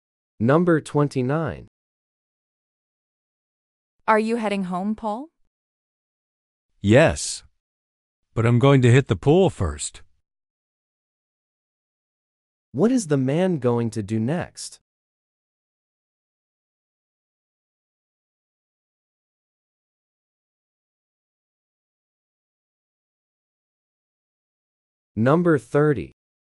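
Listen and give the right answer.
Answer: Go swimming at the pool.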